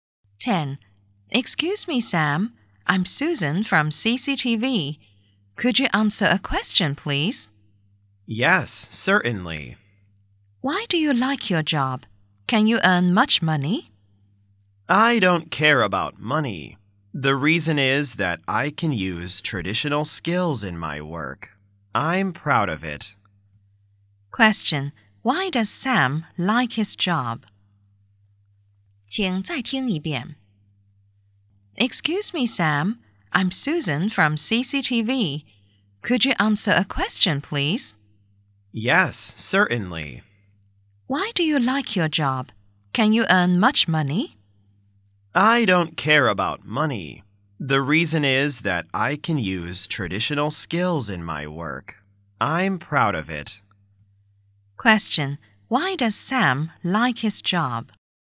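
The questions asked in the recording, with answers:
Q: Why does Sam like his job?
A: Because he can use traditional skills in his work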